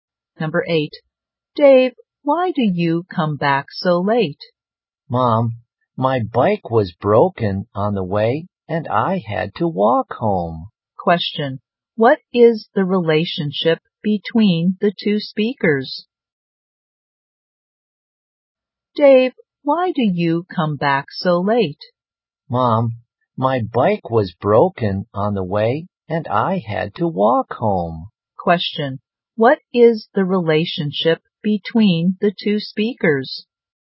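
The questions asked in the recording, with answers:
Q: Question, what is the relationship between the two speakers?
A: Mother and son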